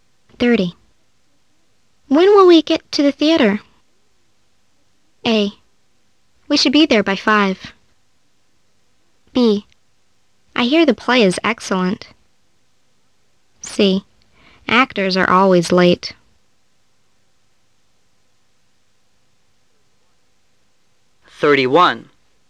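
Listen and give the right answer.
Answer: A: We should be there by 5.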